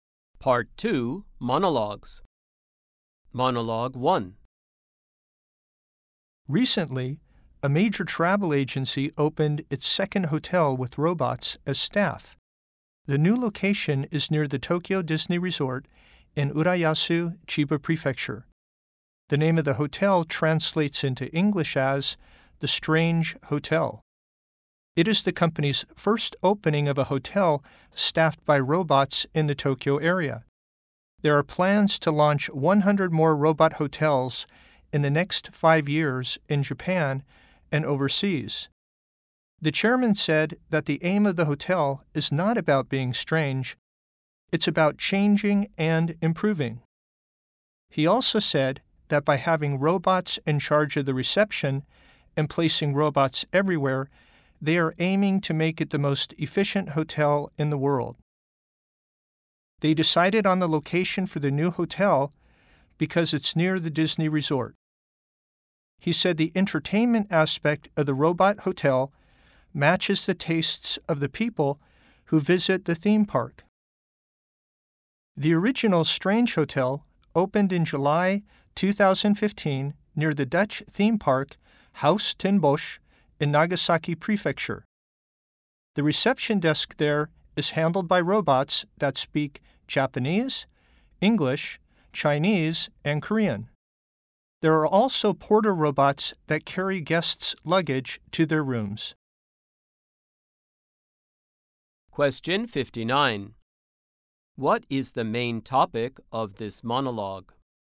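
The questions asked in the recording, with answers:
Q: What is the main topic of this monologue?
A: A new hotel staffed by robots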